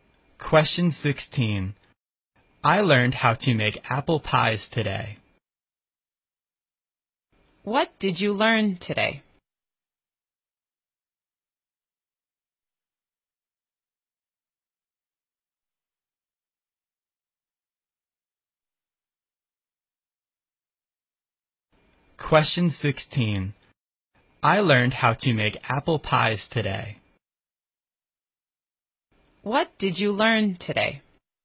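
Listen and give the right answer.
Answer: How to make apple pies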